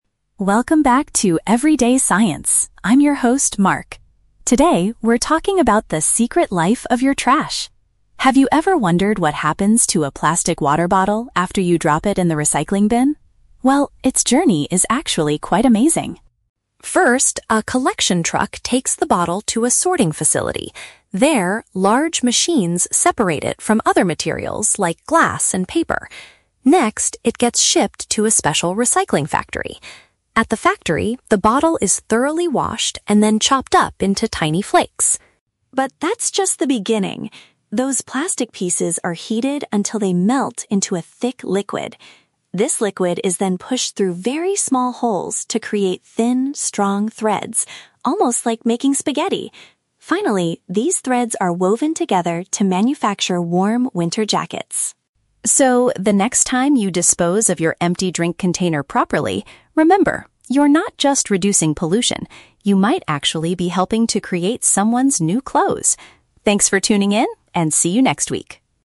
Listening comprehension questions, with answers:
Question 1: What happens at the sorting facility?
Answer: The bottle is divided from different types of waste.

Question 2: How do the factory workers create the plastic threads?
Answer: By warming up the pieces until they become liquid.

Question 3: What is the ultimate product made from the recycled bottles in this story?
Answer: An item of clothing for cold weather.

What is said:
Podcast Host: Welcome back to 'Everyday Science', I'm your host, Mark. Today, we're talking about the secret life of your trash. Have you ever wondered what happens to a plastic water bottle after you drop it in the recycling bin? Well, its journey is actually quite amazing.
First, a collection truck takes the bottle to a sorting facility. There, large machines separate it from other materials like glass and paper. Next, it gets shipped to a special recycling factory. At the factory, the bottle is thoroughly washed and then chopped up into tiny flakes.
But that's just the beginning. Those plastic pieces are heated until they melt into a thick liquid. This liquid is then pushed through very small holes to create thin, strong threads—almost like making spaghetti! Finally, these threads are woven together to manufacture warm winter jackets.
So, the next time you dispose of your empty drink container properly, remember: you're not just reducing pollution. You might actually be helping to create someone's new clothes! Thanks for tuning in, and see you next week.